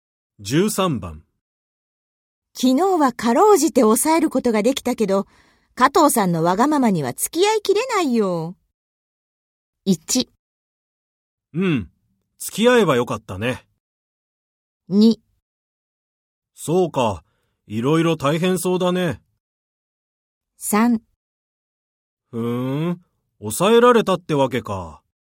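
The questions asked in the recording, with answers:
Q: 昨日はかろうじて抑えることができたけど、加藤さんのわがままには付き合いきれないよ。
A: 2: そうか、いろいろ大変そうだね。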